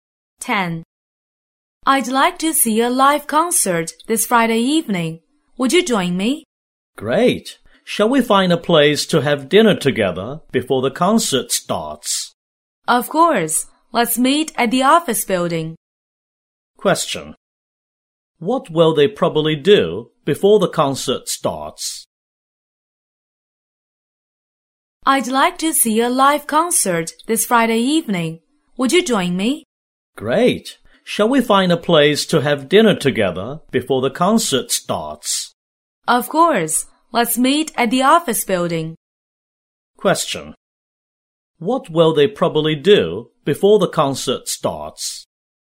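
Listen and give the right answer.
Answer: Have dinner together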